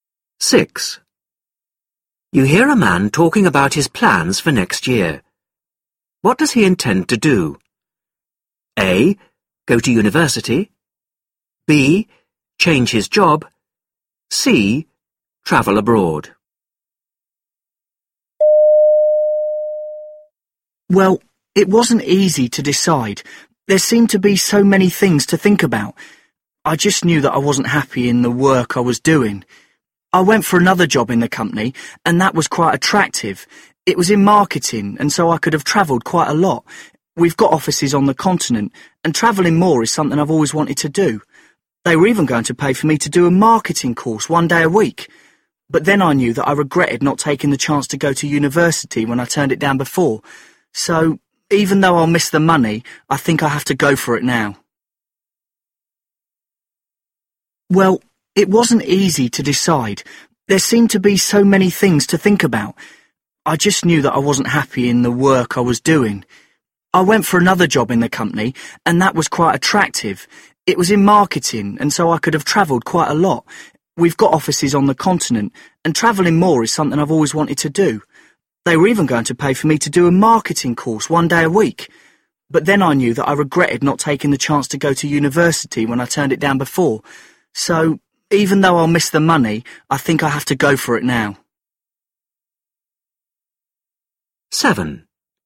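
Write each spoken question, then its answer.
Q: What does he intend to do?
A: A: Go to university.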